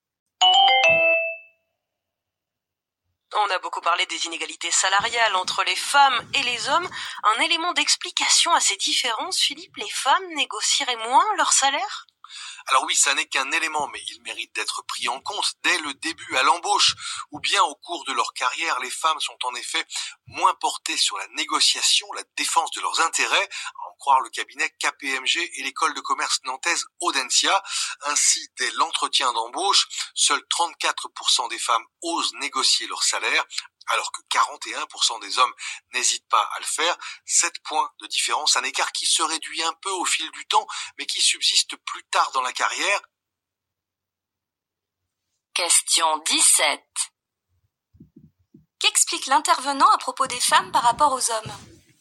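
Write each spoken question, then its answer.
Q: Qu'explique l'intervenant à propos des femmes par rapport aux hommes?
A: Elles négocient moins leur salaire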